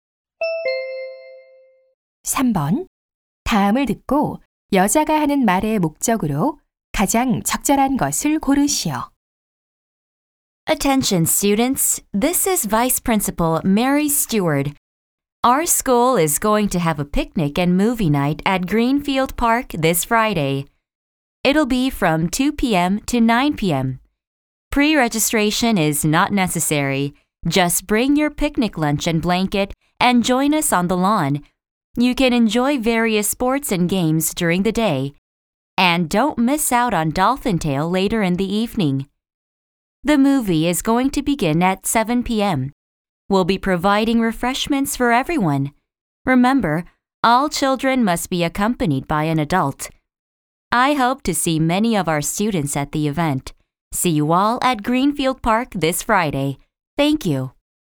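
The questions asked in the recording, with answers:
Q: 다음을 듣고 여자가 하는 말의 목적으로 가장 적절한 것을 고르시오.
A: 이번 금요일 그린필드 공원에서 열리는 학교 피크닉과 영화의 밤 행사를 안내하려고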